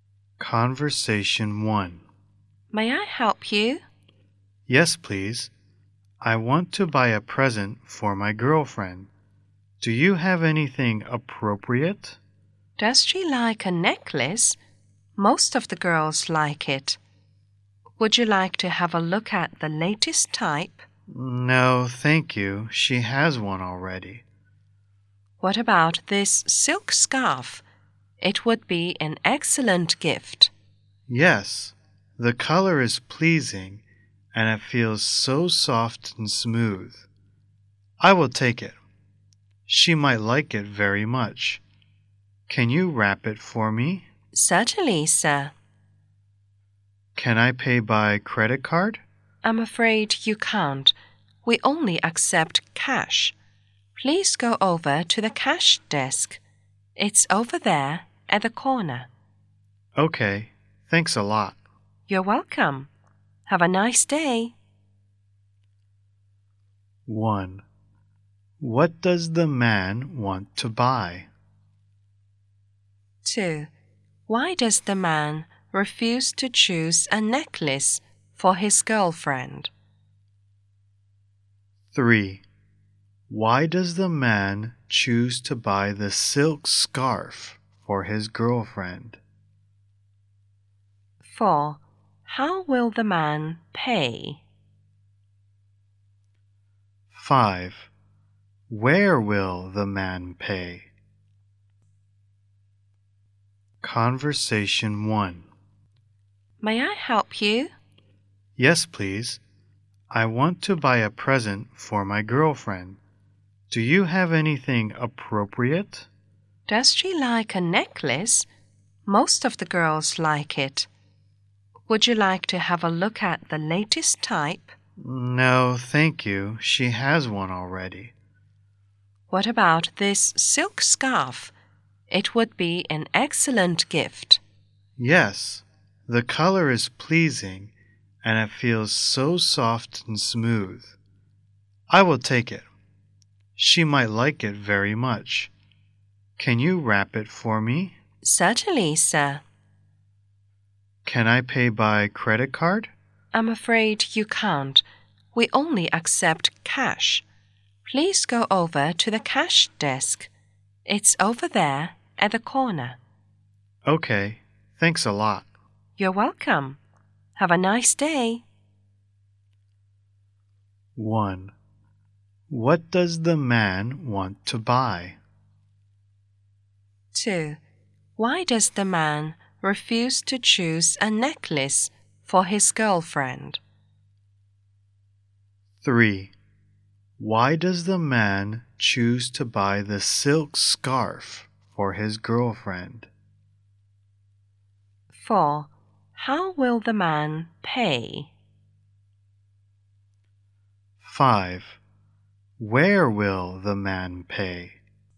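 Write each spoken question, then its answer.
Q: What does the man want to buy?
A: A present for his girlfriend (a silk scarf)

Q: Why does the man refuse to choose a necklace for his girlfriend?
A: She has one already

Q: Why does the man choose to buy the silk scarf for his girlfriend?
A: The color is pleasing and it feels soft and smooth

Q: How will the man pay?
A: In cash

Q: Where will the man pay?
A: At the cash desk in the corner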